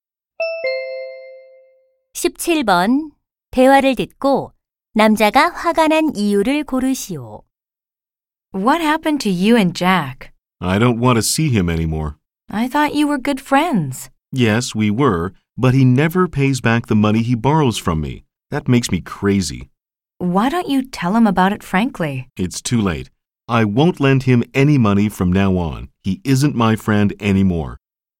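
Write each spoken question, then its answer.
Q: 대화를 듣고 남자가 화가 난 이유를 고르시오.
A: Jack이 빌려 간 돈을 갚지 않아서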